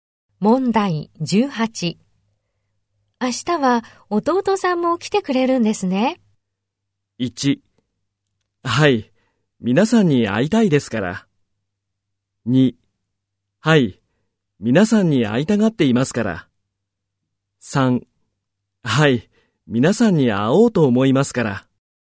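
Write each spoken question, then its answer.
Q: 明日は弟さんも来てくれるんですね。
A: 2: はい、皆さんに会いたがっていますから。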